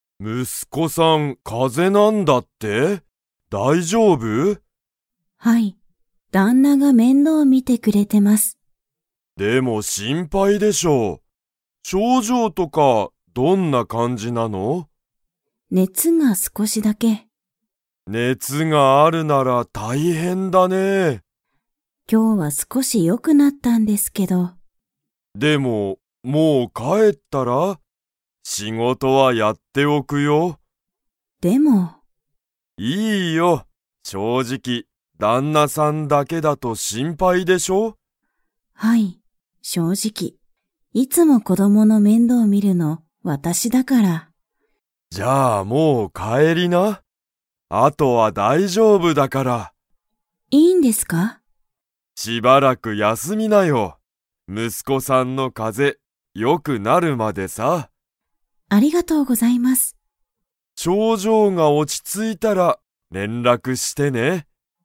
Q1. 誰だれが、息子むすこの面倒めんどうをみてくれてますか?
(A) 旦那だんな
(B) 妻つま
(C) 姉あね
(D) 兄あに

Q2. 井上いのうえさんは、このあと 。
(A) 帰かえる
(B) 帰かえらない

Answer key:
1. (A) 旦那だんな
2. (A) 帰かえる

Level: Level 4

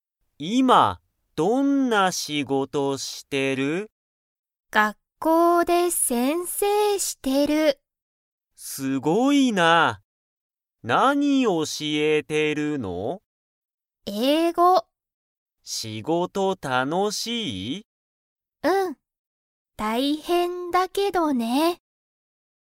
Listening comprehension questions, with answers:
まみは、学校(がっこう)で____を教(おし)えている。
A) 日本語(にほんご)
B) 英語(えいご)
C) 先生せんせい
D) 仕事しごと)(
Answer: B) 英語(えいご)

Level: Level 1

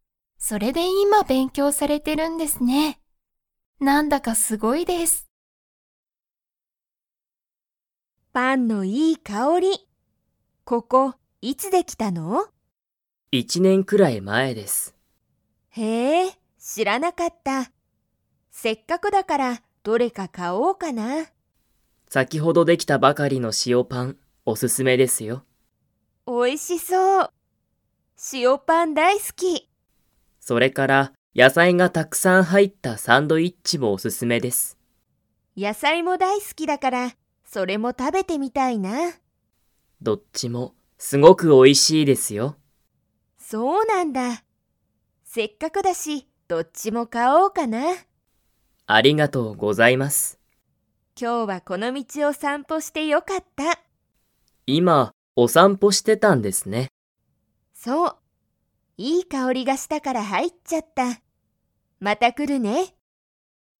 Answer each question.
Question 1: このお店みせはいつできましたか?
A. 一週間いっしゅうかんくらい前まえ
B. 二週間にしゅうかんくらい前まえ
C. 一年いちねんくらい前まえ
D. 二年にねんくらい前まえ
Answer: C. 一年いちねんくらい前まえ

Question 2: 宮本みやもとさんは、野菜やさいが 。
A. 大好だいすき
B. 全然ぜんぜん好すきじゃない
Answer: A. 大好だいすき

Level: Level 4

